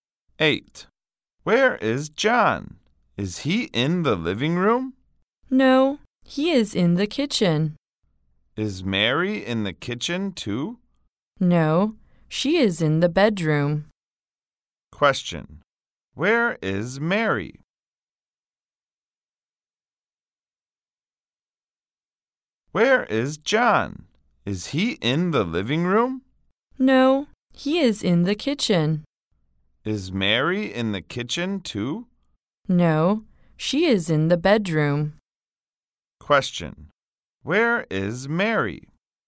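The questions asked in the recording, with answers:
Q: where is Mary?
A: In the bedroom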